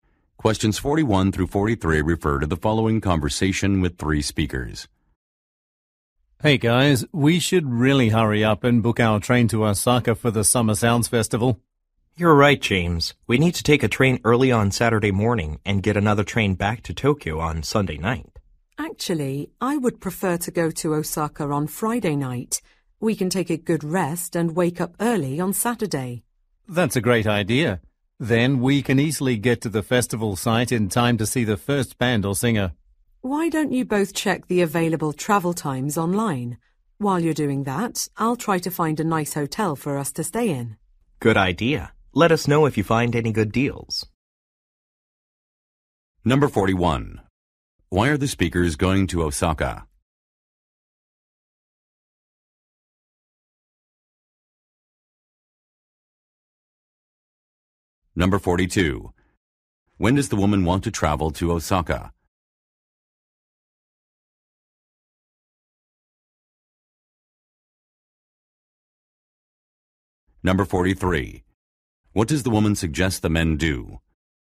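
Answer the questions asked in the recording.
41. To attend a music festival (Summer Sounds Festival)
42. On Friday night
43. Check the available travel times online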